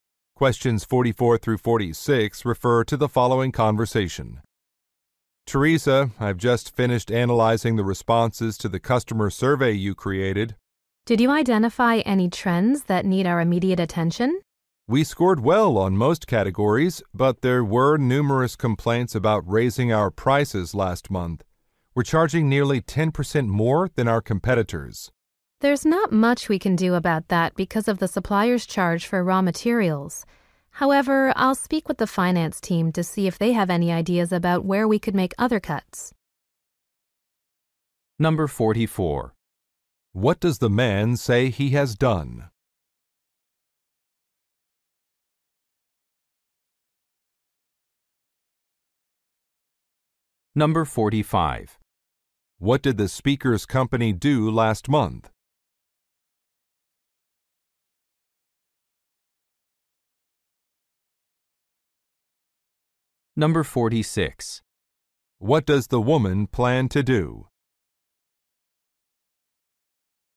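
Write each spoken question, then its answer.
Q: What does the man say he has done?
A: He finished analyzing the customer survey responses

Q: What did the speaker's company do last month?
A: It raised its prices

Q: What does the woman plan to do?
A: Talk with the finance team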